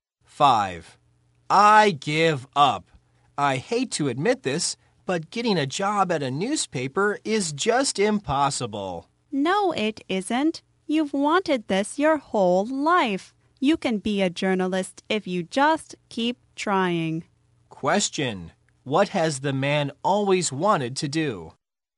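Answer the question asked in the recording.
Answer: Be a journalist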